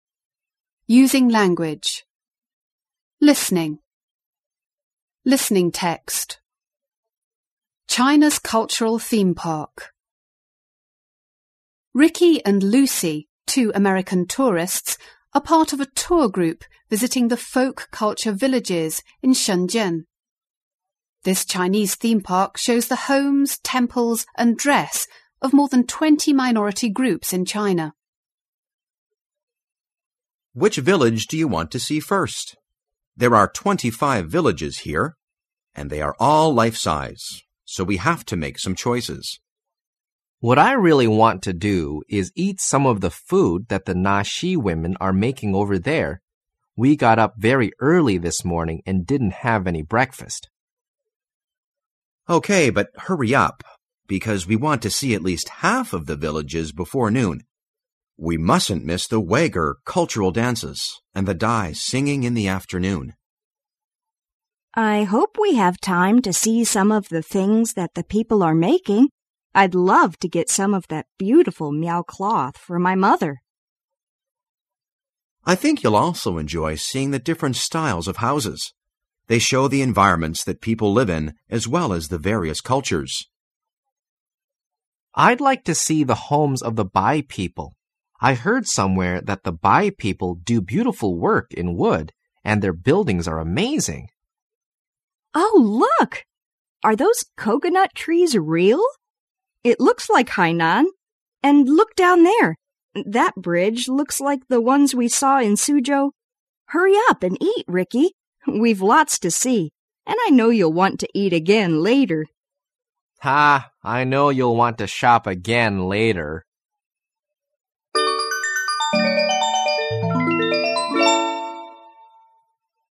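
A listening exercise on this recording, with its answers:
3.Listen to the tape again and answer the following questions.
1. What is the purpose of the Folk Culture Villages?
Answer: To show the homes, temples and dress of more than 20 minority groups in China.

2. What things does the guide think are the most important to see?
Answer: The Uygur dances, the Dai singing and the different styles of houses.

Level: 高中英语必修四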